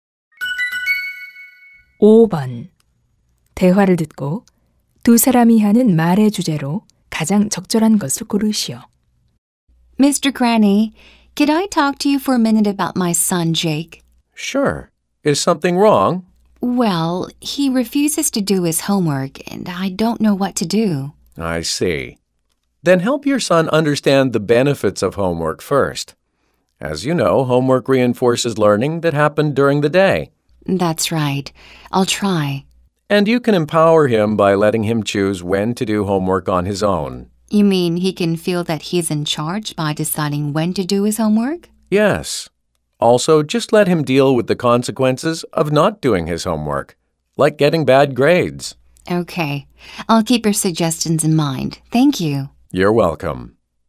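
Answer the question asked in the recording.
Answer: 아이가 숙제를 하도록 돕는 방법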